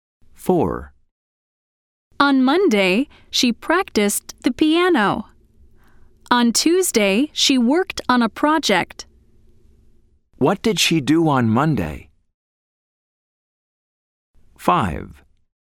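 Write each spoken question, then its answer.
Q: What did she do on Monday?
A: She practiced the piano.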